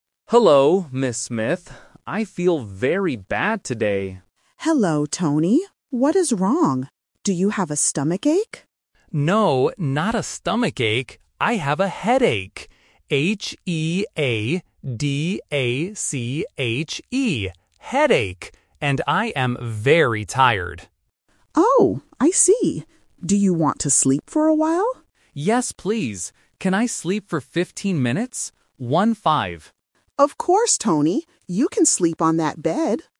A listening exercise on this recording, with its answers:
Listen to the conversation between a student and the school nurse. Choose the correct answer (A, B, or C).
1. What is wrong with the boy?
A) He has a stomachache.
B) He has a toothache.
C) He has a headache.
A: He has a headache.

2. How does the boy spell the word "headache"?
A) H-E-A-D-A-C-H-E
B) H-A-E-D-A-C-H-E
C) H-E-D-A-C-H-E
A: H-E-A-D-A-C-H-E

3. How many minutes does the boy want to sleep?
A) 50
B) 15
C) 5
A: 15

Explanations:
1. The boy clearly says, "I have a headache." Option (A) is the trap because the nurse asks if he has a stomachache, but he says "No". Option (B) is another illness but is not mentioned in the audio.
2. The boy spells the word loudly and slowly: "H-E-A-D-A-C-H-E." Options (B) and (C) are spelling traps for A1 learners who might be confused by the vowels.
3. The boy asks, "Can I sleep for fifteen minutes?" and clarifies by saying "One-five." Option (A) is a classic A1 phonetic trap (fifty vs. fifteen).

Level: A1

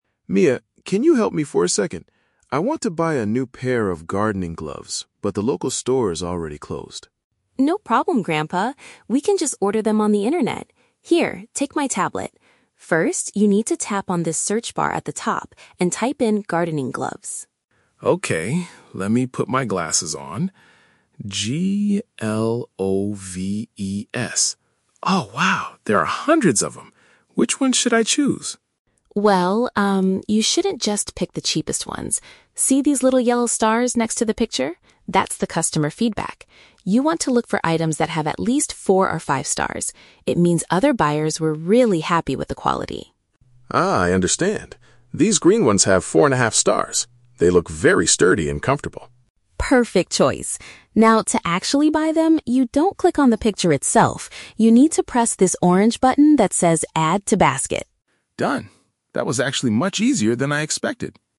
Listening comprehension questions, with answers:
Listen to a conversation between a grandfather and his granddaughter. Choose the best answer (A, B, or C) for each question.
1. What is the first step the grandfather must take on the tablet?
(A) Open a new account on the shopping application.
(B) Enter the name of the item he is looking for.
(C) Take a picture of his old gardening gloves.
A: Enter the name of the item he is looking for.

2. How does Mia advise her grandfather to select a good quality product?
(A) By checking the scores given by previous purchasers.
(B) By always choosing the items with the lowest price.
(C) By reading the detailed descriptions of the materials.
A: By checking the scores given by previous purchasers.

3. What should the grandfather touch to prepare the item for purchase?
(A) The yellow stars located next to the product's name.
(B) The large photograph of the green gloves.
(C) The orange button to place it in his virtual cart.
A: The orange button to place it in his virtual cart.

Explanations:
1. Mia tells her grandfather to "tap on this search bar at the top and type in 'gardening gloves'." Option B paraphrases this as "enter the name of the item."
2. Mia tells him to look for the "yellow stars" which represent the "customer feedback," meaning other buyers were happy. Option A paraphrases this as "the scores given by previous purchasers."
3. Mia instructs him to "press this orange button that says 'Add to Basket'." Option C paraphrases this perfectly as placing it in his "virtual cart" (Basket = Cart).

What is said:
Grandpa: Mia, can you help me for a second? I want to buy a new pair of gardening gloves, but the local store is already closed.
Mia: No problem, Grandpa. We can just order them on the internet. Here, take my tablet. First, you need to tap on this search bar at the top and type in "gardening gloves".
Grandpa: Okay, let me put my glasses on... Oh, wow! There are hundreds of them. Which ones should I choose?
Mia: Well, um, you shouldn't just pick the cheapest ones. See these little yellow stars next to the picture? That's the customer feedback. You want to look for items that have at least four or five stars. It means other buyers were really happy with the quality.
Grandpa: Ah, I understand. These green ones have four and a half stars. They look very sturdy and comfortable.
Mia: Perfect choice. Now, to actually buy them, you don't click on the picture itself. You need to press this orange button that says "Add to Basket".

